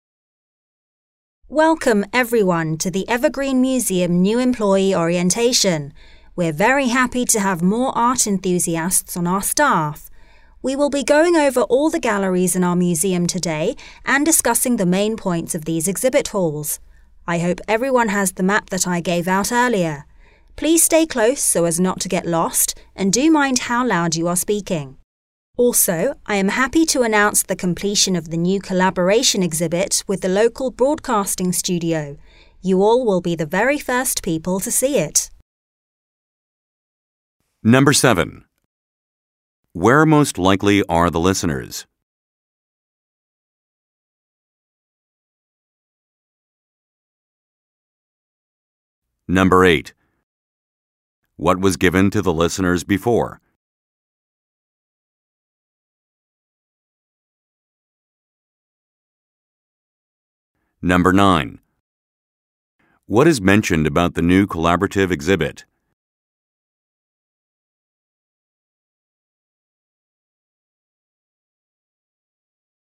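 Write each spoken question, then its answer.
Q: Where most likely are the listeners?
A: At a museum (new employee orientation)

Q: What was given to the listeners before?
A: A map

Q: What is mentioned about the new collaborative exhibit?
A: It was made with a local broadcasting studio and was just completed; the listeners will be the first to see it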